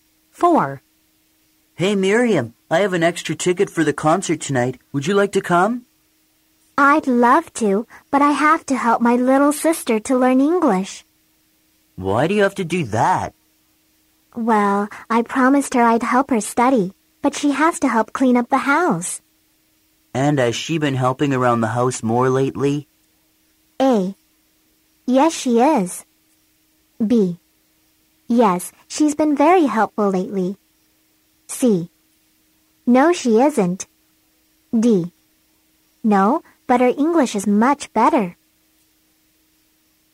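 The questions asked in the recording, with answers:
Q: And has she been helping around the house more lately?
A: B: Yes, she's been very helpful lately.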